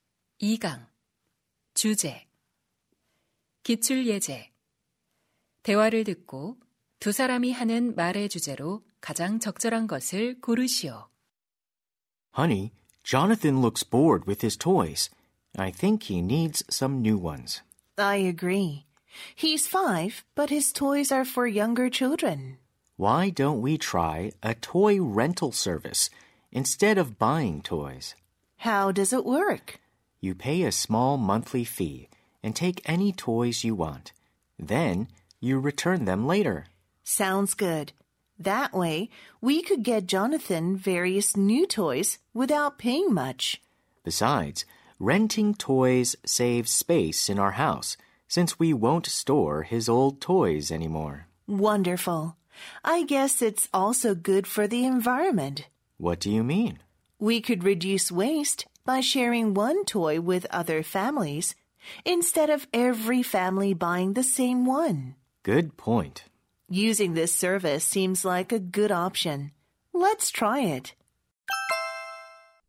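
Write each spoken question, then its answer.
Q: 대화를 듣고 두 사람이 하는 말의 주제로 가장 적절한 것을 고르시오.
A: 장난감 대여 서비스 이용의 장점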